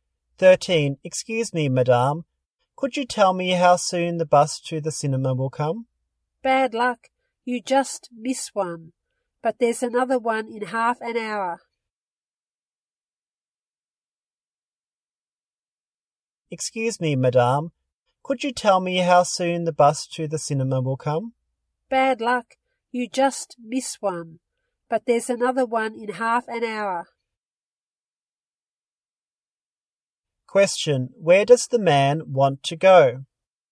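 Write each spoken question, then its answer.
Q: where does the man want to go?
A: To the cinema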